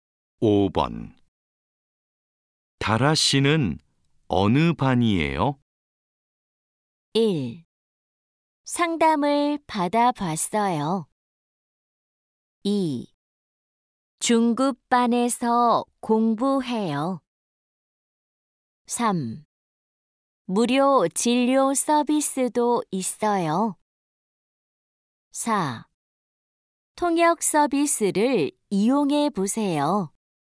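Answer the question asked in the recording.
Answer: 2: 중급반에서 공부해요.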